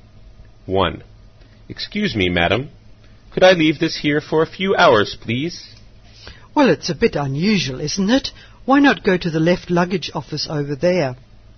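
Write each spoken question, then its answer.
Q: What does the man ask the woman to do?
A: Look after his luggage for a few hours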